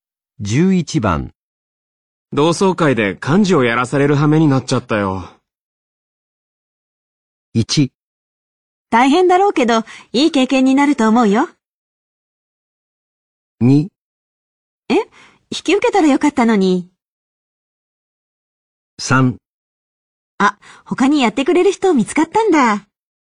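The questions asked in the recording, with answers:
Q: 同窓会で幹事をやらされる羽目になっちゃったよ。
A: 1: 大変だろうけど、いい経験になると思うよ。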